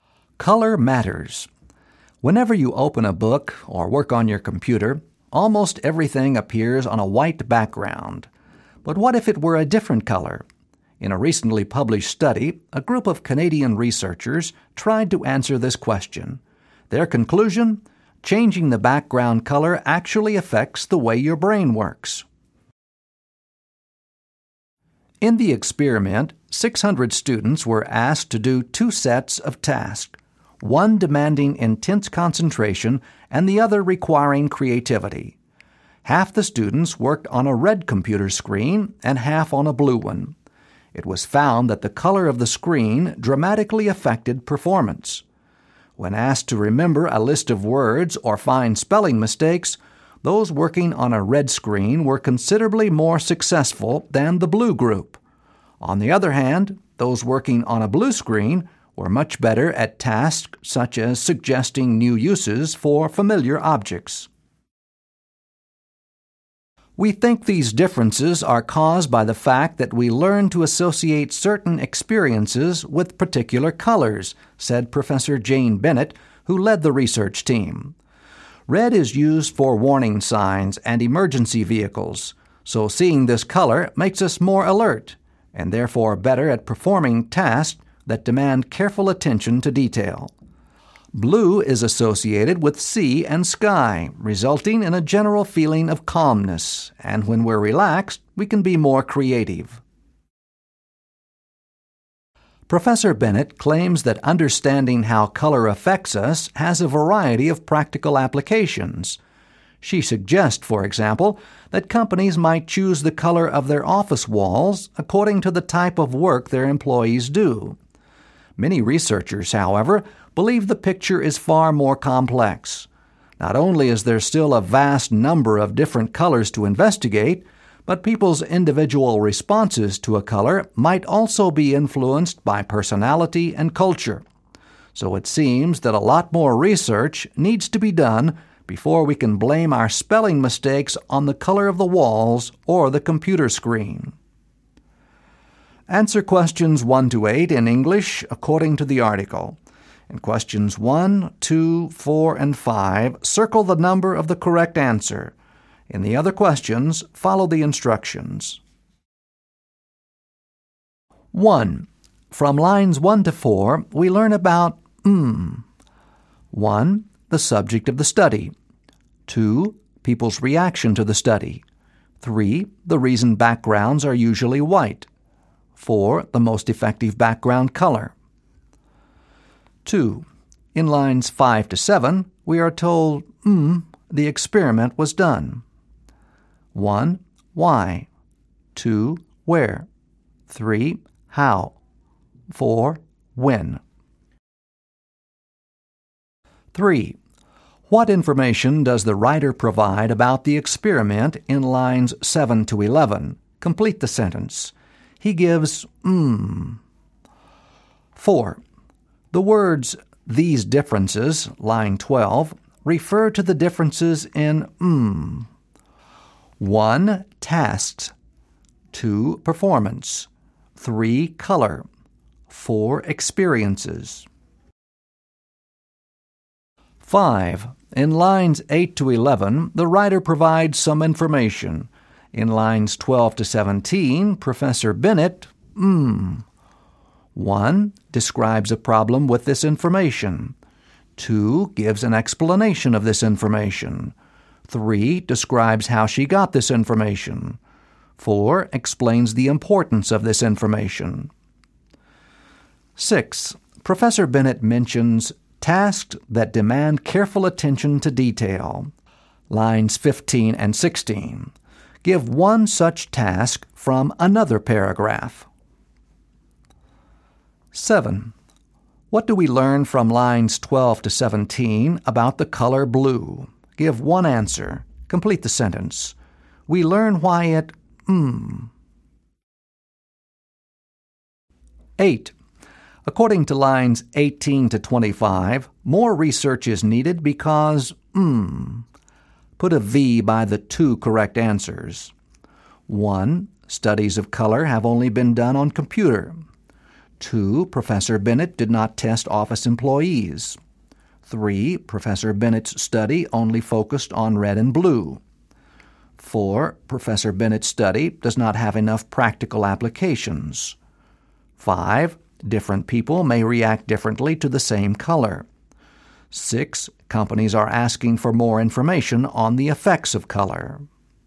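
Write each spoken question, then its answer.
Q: From lines 1 to 4, we learn about 1.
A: 1: The subject of the study.

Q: In lines 5 to 7, we are told, the experiment was done.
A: 3: How?

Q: The words, these differences, line 12, refer to the differences in, 1.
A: 2: Performance.

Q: In lines 12 to 17, Professor Bennett, 1.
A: 2: Gives an explanation of this information.

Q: Professor Bennett mentions tasks that demand careful attention to detail.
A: Remembering a list of words or finding spelling mistakes

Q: What do we learn from lines 12 to 17 about the color blue?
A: We learn why it makes us calm/more creative

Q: According to lines 18 to 25, more research is needed because...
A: 3: Professor Bennett's study only focused on red and blue; 5: Different people may react differently to the same color.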